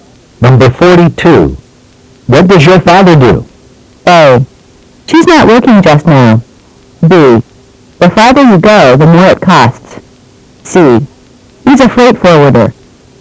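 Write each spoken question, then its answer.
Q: What does your father do?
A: C: He's a freight forwarder.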